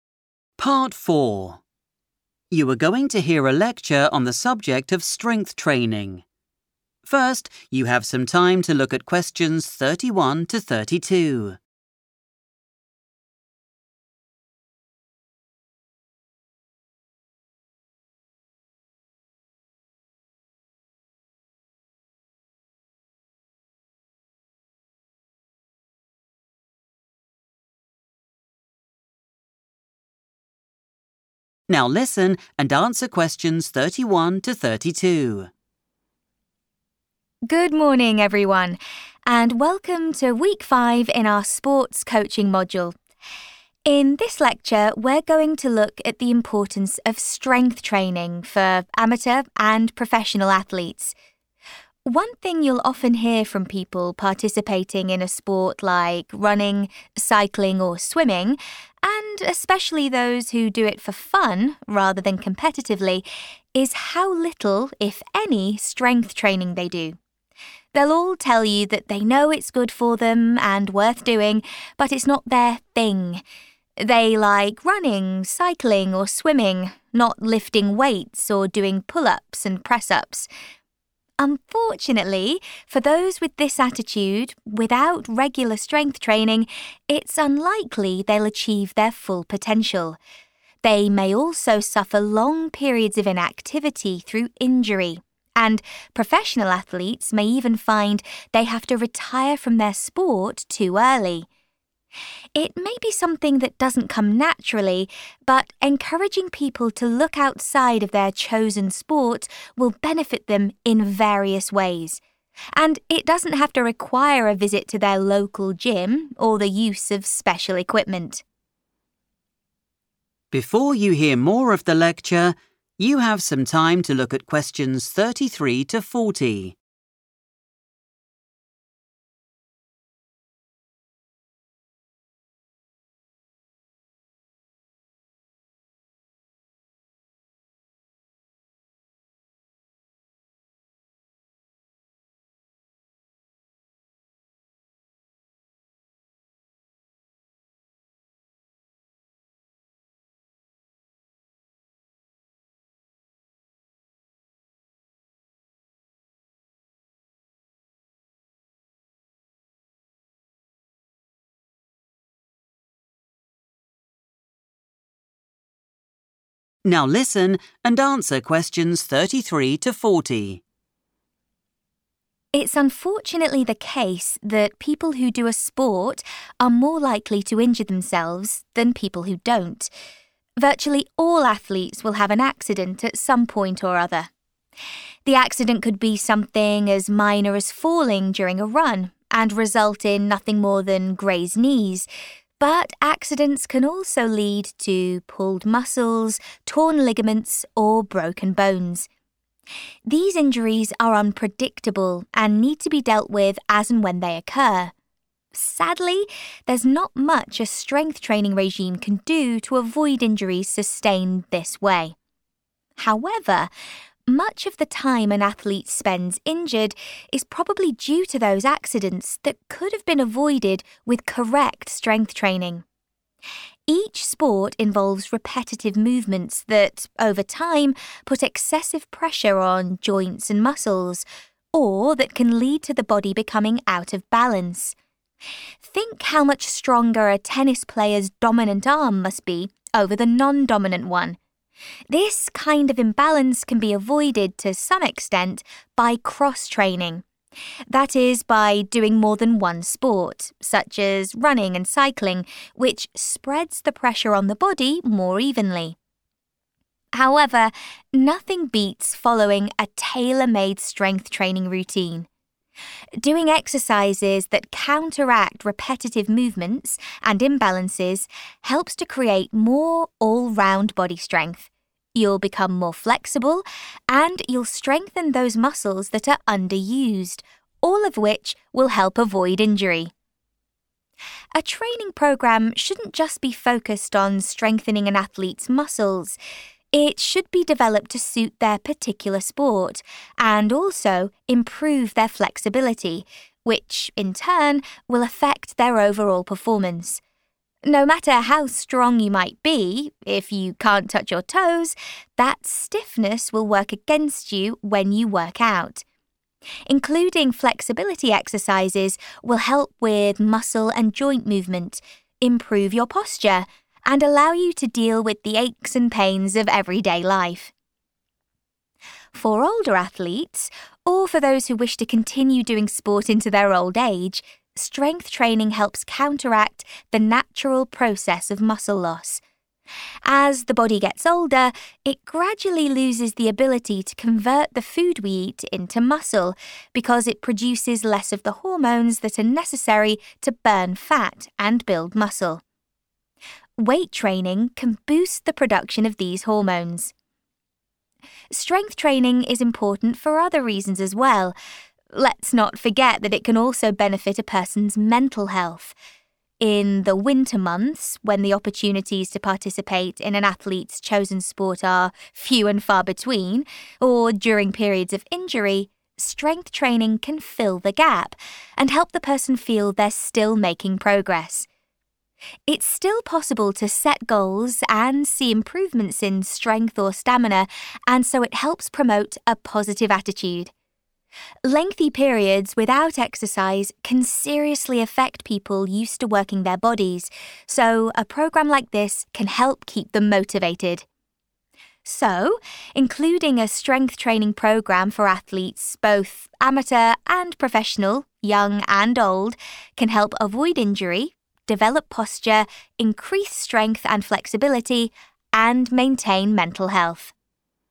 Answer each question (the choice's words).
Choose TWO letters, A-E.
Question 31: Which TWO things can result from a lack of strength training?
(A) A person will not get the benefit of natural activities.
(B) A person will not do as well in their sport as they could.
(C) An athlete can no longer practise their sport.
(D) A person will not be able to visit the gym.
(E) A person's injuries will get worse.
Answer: A person will not do as well in their sport as they could.

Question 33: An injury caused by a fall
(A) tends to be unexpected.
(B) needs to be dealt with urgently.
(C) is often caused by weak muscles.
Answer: tends to be unexpected.

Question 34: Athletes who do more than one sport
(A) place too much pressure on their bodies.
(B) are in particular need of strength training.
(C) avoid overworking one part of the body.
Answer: avoid overworking one part of the body.

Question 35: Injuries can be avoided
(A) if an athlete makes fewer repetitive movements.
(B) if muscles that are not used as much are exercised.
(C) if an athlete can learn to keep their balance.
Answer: if muscles that are not used as much are exercised.

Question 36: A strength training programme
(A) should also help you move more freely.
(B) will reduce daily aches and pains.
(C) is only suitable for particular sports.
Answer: should also help you move more freely.

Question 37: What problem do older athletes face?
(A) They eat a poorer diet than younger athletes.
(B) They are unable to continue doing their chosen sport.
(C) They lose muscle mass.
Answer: They lose muscle mass.

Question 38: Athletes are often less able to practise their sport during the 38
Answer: winter months

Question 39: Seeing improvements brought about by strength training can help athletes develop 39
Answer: positive attitude

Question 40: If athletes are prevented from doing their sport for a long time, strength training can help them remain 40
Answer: motivated

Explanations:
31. The correct answer is identified because the lecturer mentions two specific risks for people who skip strength training. First, they will likely not reach their "full potential," which means they won't do as well as they possibly could. Second, professional athletes might have to "retire" (stop their career or practice) too early because of injuries.
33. The correct answer is A because the speaker describes accidents, like a fall during a run, as being 'unpredictable.' In English, 'unpredictable' is a synonym for 'unexpected' because both words describe something that you cannot see coming or know about in advance. The text also mentions that these types of injuries cannot be prevented by strength training, which further shows they happen by chance or surprise.
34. The correct answer is supported by the lecturer's explanation of cross-training. When an athlete does only one sport, they perform repetitive movements that put too much pressure on specific parts of the body. By doing more than one sport, the pressure is spread more evenly across the body, meaning no single part is overworked.
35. The correct answer is B because the text says that sports often use the same movements over and over, which can make some parts of the body stronger than others. This imbalance can lead to getting hurt. To stop this, people should do a strength training plan that makes the muscles they rarely use stronger.
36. The correct answer is A because the speaker mentions that a strength training routine makes someone more flexible. In English, being flexible means your joints and muscles can move through their full range easily, which is the same as moving more freely. This routine helps take care of parts of the body that are not used often in a specific sport, which balances the body and prevents injury.
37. The correct answer is C because the lecturer explains that doing a sport 'over time' (for many years) can lead to parts of the body becoming 'out of balance.' This often means certain muscles are 'under-used' and become weak. To fix this, athletes need a strength training routine to build 'all-round body strength' and 'strengthen' the muscles that have become weak over the years.
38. The correct answer is 'winter months' because the lecturer discusses how athletes often face times when they cannot do their normal training. The transcript mentions that they can 'suffer long periods of inactivity,' which means times when they are not doing their sport. For people who enjoy outdoor sports like running or cycling—which are mentioned at the beginning—the winter months are the standard time when they are less able to practice.
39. The correct answer is correct because the lecturer mentions that many athletes have a specific 'attitude'—they think strength training is not for them or 'not their thing.' This negative mindset stops them from reaching their 'full potential.' By trying strength training and seeing results, athletes can change this feeling and develop a better, more 'positive' way of thinking about their work, which helps them reach their goals.
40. The correct answer is "motivated" because the transcript highlights that athletes often face "long periods of inactivity" due to injuries. During these times when they are prevented from doing their main sport, strength training gives them a productive way to spend their time and a sense of progress, which helps them stay determined and mentally strong rather than giving up.

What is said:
Lecturer: Good morning, everyone, and welcome to week five in our sports coaching module. In this lecture we're going to look at the importance of strength training for amateur and professional athletes. One thing you'll often hear from people participating in a sport like running, cycling or swimming, and especially those who do it for fun rather than competitively, is how little, if any, strength training they do. They'll all tell you that they know it's good for them and worth doing but it's not their 'thing'. They like running, cycling or swimming, not lifting weights or doing pull-ups and press-ups.
Unfortunately for those with this attitude, without regular strength training, it's unlikely they'll achieve their full potential. They may also suffer long periods of inactivity through injury, and professional athletes may even find they have to retire from their sport too early. It may be something that doesn't come naturally but encouraging people to look outside of their chosen sport will benefit them in various ways. And it doesn't have to require a visit to their local gym or the use of special equipment.
It's unfortunately the case that people who do a sport are more likely to injure themselves than people who don't. Virtually all athletes will have an accident at some point or other. The accident could be something as minor as falling during a run and result in nothing more than grazed knees, but accidents can also lead to pulled muscles, torn ligaments or broken bones. These injuries are unpredictable and need to be dealt with as and when they occur. Sadly, there's not much a strength training regime can do to avoid injuries sustained this way.
However, much of the time an athlete spends injured is probably due to those accidents that could have been avoided with correct strength training. Each sport involves repetitive movements that over time put excessive pressure on joints and muscles, or that can lead to the body becoming out of balance. Think how much stronger a tennis player's dominant arm must be over the non-dominant one. This kind of imbalance can be avoided to some extent by cross-training, that is by doing more than one sport, such as running and cycling, which spreads the pressure on the body more evenly. However, nothing beats following a tailor-made strength training routine. Doing exercises that counteract repetitive movements and imbalances helps to create more all-round body strength. You'll become more flexible and you'll strengthen those muscles that are under-used, all of which will help avoid injury.